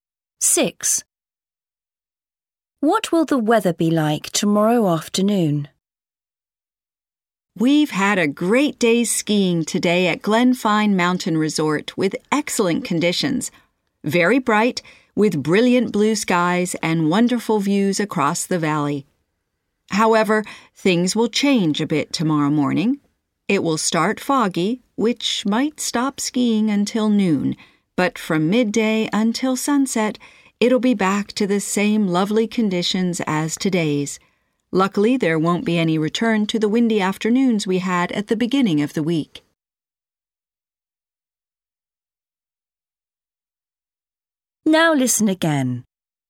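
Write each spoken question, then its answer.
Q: What will the weather be like tomorrow afternoon?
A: Sunny and bright with blue skies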